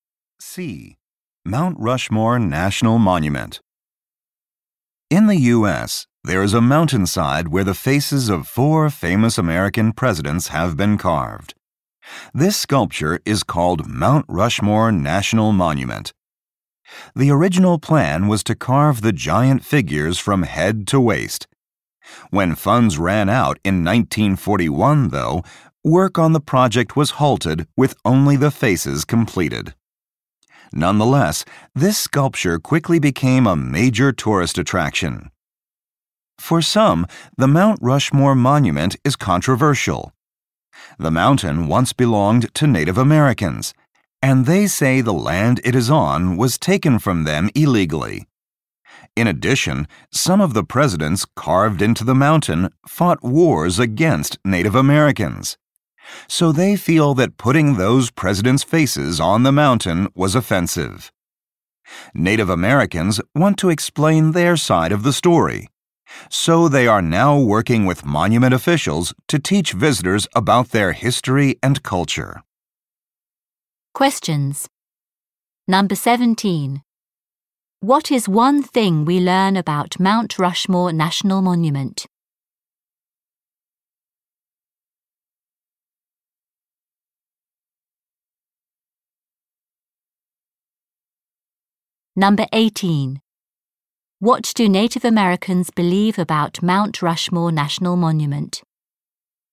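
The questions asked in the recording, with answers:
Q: What is one thing we learn about Mount Rushmore National Monument?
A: It was never finished because the money ran out, so only the faces were carved.

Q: What do Native Americans believe about Mount Rushmore National Monument?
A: The land was taken from them illegally, and the carvings are offensive.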